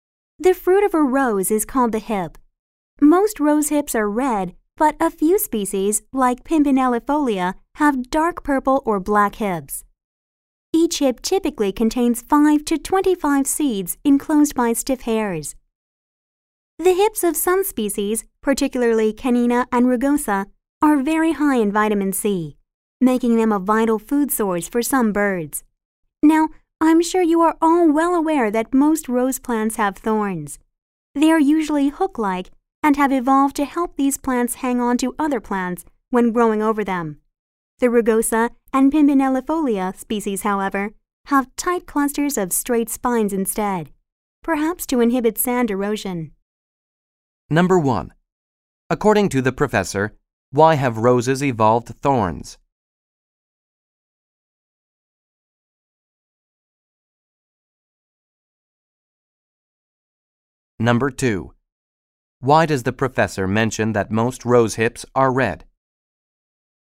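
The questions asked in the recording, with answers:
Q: According to the professor, why have roses evolved thorns?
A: To help the plants hang on to other plants when growing over them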